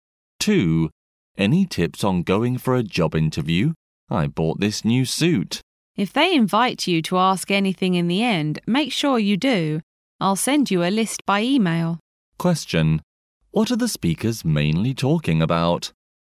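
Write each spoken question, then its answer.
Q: What are the speakers mainly talking about?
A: Tips for a job interview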